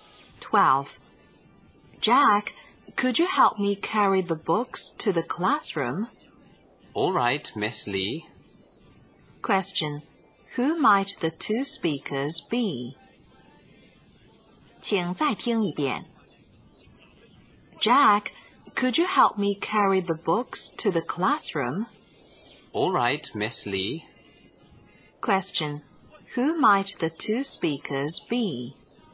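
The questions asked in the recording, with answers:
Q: Who might the two speakers be?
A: Teacher and student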